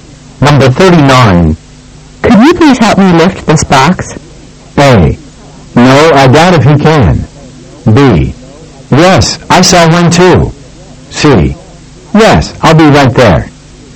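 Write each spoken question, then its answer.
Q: Could you please help me lift this box?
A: C: Yes, I'll be right there.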